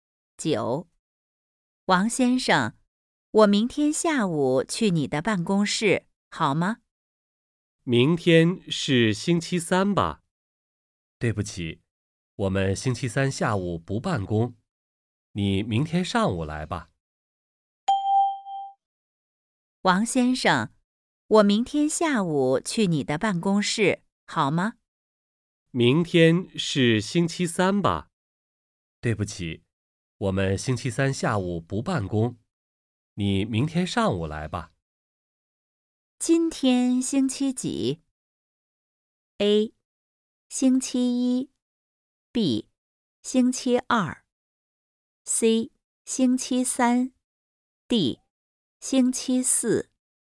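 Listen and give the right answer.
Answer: B: 星期二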